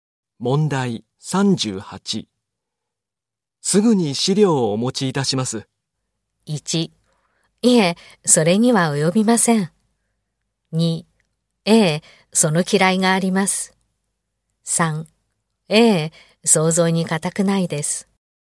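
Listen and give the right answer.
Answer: 1: いえ、それには及びません。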